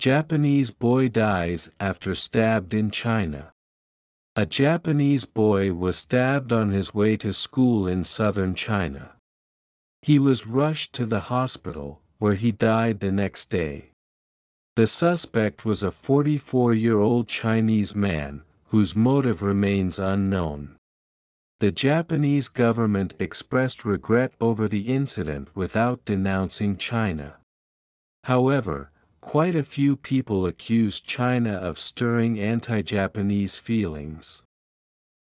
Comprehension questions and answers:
英語ニュースの音声を聞き、各空欄に入る英文を正確に書き取ってください。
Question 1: A Japanese boy was stabbed ( ).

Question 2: He was rushed to the hospital, ( ).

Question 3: The suspect was a 44-year-old Chinese man, ( ).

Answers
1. on his way to school in southern China
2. where he died the next day
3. whose motive remains unknown

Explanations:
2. ⇒ 前日に何か出来事があり、その「次の日」を明確に指定しているため「the」が必要です。冠詞がないと、漠然とした「次の日」という意味になり、具体的な日を示すニュアンスが失われます。
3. ⇒ 「remain」は「ある状態がずっと続いている」という意味を強調する一般動詞で、be動詞に似た働きをしています。

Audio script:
Japanese Boy Dies After Stabbed in China
A Japanese boy was stabbed on his way to school in southern China.
He was rushed to the hospital, where he died the next day.
The suspect was a 44-year-old Chinese man, whose motive remains unknown.
The Japanese government expressed regret over the incident without denouncing China.
However, quite a few people accuse China of stirring anti-Japanese feelings.